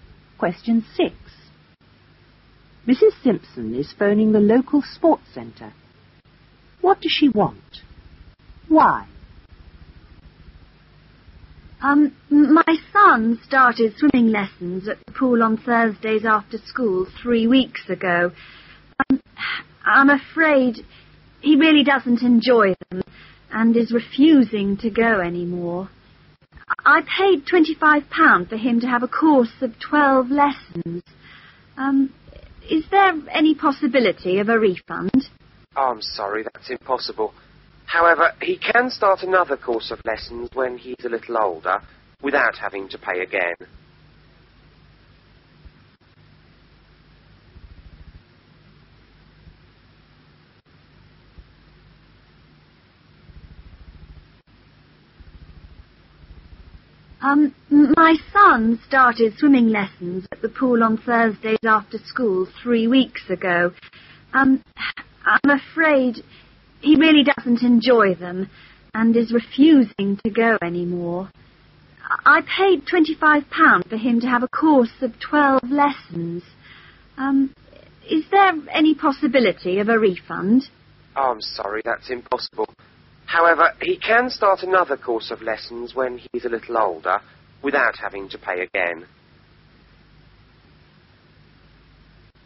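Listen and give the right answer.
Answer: A refund, because her son doesn't enjoy the swimming lessons and refuses to go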